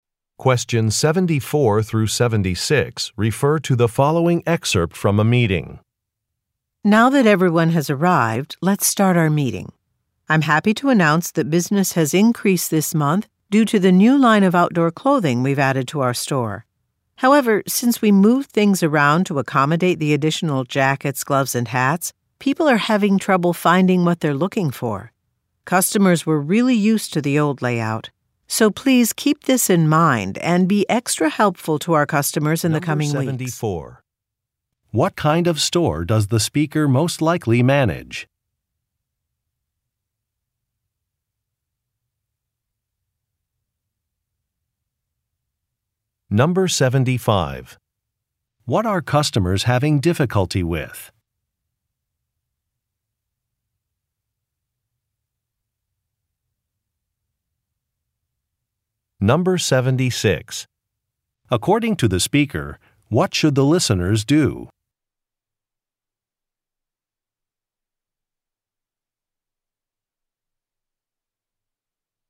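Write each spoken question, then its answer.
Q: What kind of store does the speaker most likely manage?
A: A clothing store

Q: What are customers having difficulty with?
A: Finding items after the store layout changed

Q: According to the speaker, what should the listeners do?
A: Be extra helpful to customers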